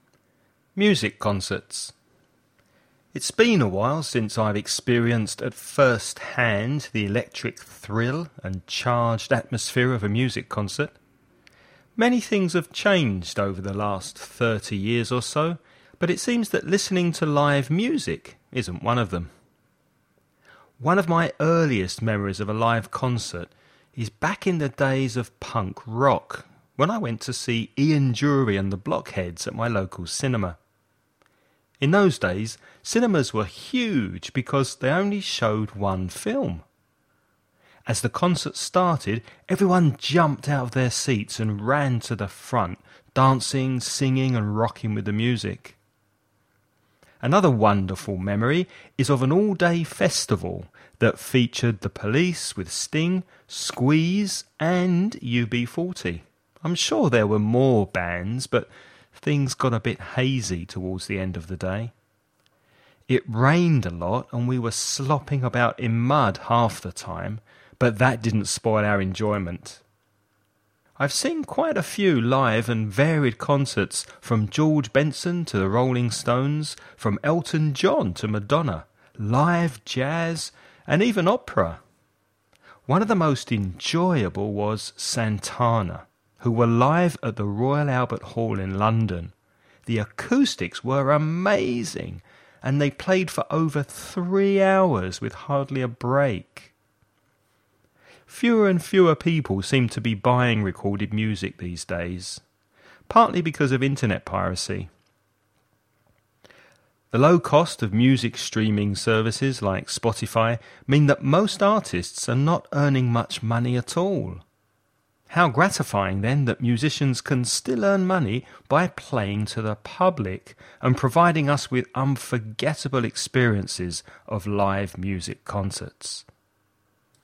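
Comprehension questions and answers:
Listen and write the questions you hear.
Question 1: What does the man say has not changed over the last 30 years?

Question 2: Which type of music was popular when the speaker first went to a concert?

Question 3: Why were cinemas so big in those days?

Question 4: What was the weather like when the speaker went to the all-day festival?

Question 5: What reason does the speaker give for people buying less music these days?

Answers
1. listening to live music
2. punk rock
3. because they only showed one film
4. it rained a lot
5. internet piracy

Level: nivel avanzado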